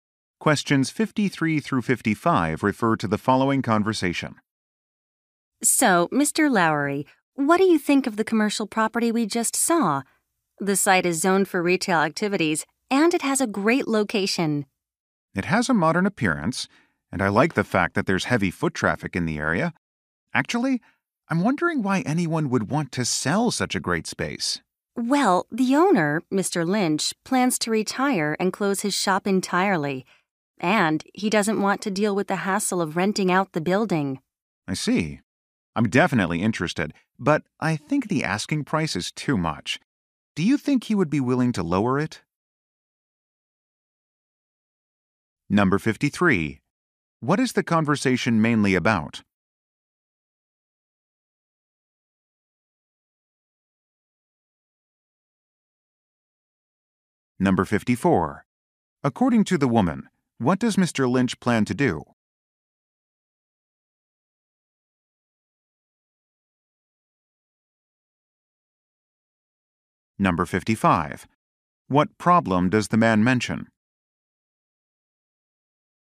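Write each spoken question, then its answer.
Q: What is the conversation mainly about?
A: A commercial property for sale

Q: According to the woman, what does Mr. Lynch plan to do?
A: Retire and close his shop

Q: What problem does the man mention?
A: The asking price is too high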